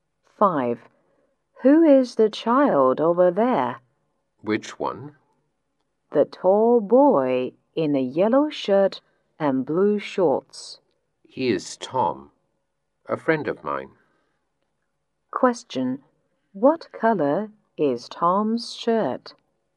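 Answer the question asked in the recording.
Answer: Yellow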